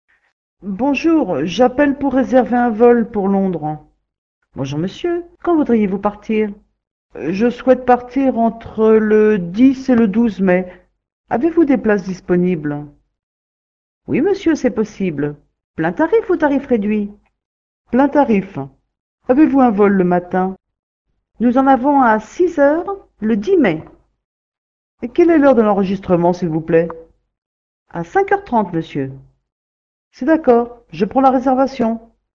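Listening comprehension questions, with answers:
Escucha el audio y completa los huecos con las palabras que faltan.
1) - Bonjour, j'appelle pour un vol Londres.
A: réserver / pour

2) - Bonjour monsieur, quand voudriez-vous ?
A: partir

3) - Je partir entre le 10 et le 12 mai, avez-vous des disponibles ?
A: souhaite / places

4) -Oui monsieur c'est possible, tarif ou tarif ?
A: plein / réduit

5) - Plein tarif. Avez-vous un vol le ?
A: matin

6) - Oui nous en avons un à 6 le 10 mai.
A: heures

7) - À quelle heure est l' s'il vous plaît ?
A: enregistrement

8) - C'est d'accord, je prends la .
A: réservation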